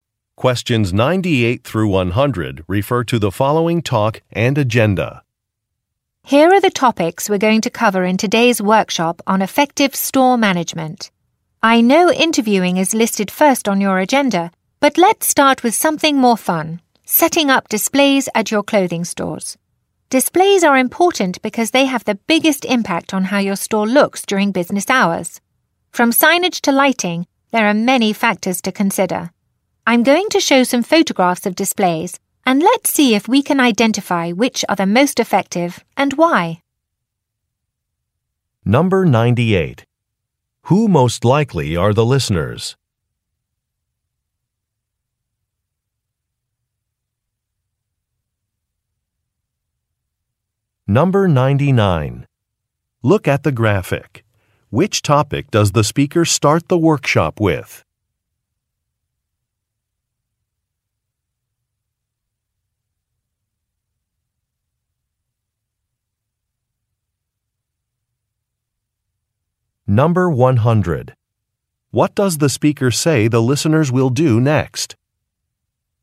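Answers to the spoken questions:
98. Store managers (clothing store managers)
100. Look at photographs of displays and identify the most effective ones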